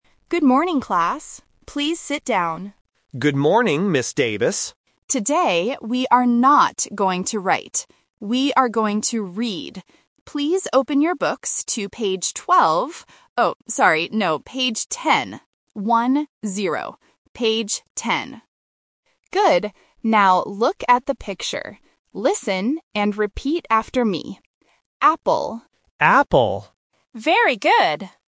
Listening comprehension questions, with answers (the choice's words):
Listen to the teacher's instructions in class and choose the correct answer (A, B, or C).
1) What are the students going to do today?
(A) Write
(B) Read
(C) Sing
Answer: Read

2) What page do the students need to open?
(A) Page 12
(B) Page 10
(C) Page 20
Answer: Page 10

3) What word do the students repeat?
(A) Book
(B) Picture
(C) Apple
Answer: Apple

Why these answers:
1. The teacher clearly states, "We are going to read." Option (A) is the trap because the teacher mentions "write" but rejects it ("we are not going to write"). Option (C) is a plausible classroom activity but is not mentioned in the audio.
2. The teacher corrects herself by saying, "Oh, sorry, no. Page ten. One-zero." Option (A) is the trap because "page twelve" was mentioned first but then rejected as a mistake. Option (C) is a phonetic trap (twenty vs. ten) and is not mentioned.
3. The teacher asks the class to listen and repeat, and then says "Apple". The whole class repeats the word "Apple!". Option (A) and (B) are traps; the words "books" and "picture" are mentioned by the teacher earlier, but they are not the words the students are asked to repeat.

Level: A1